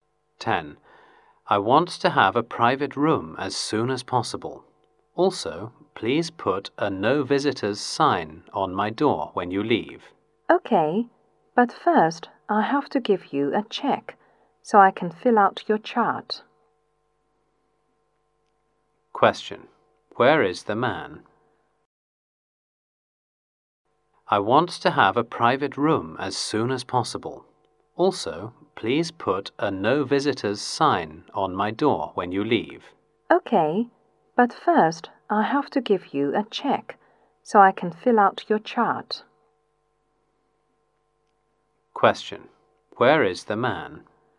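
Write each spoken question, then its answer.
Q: Where is the man?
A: In a hospital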